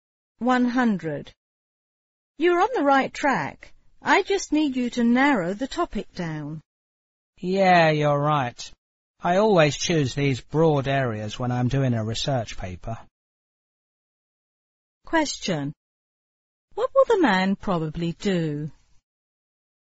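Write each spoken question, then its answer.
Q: What will the man probably do?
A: Narrow down the topic of his research paper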